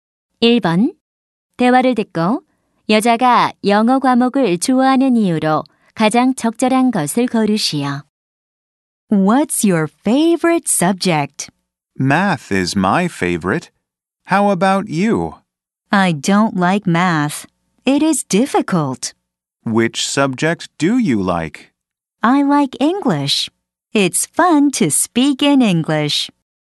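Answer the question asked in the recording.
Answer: 영어로 말하는 것이 재미있어서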